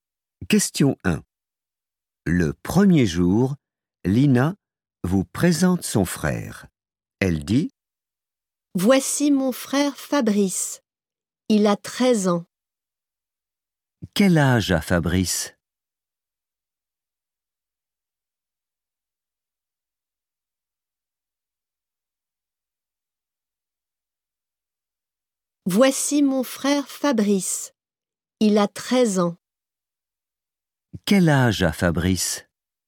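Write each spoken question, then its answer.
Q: Quel âge a Fabrice?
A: 13 ans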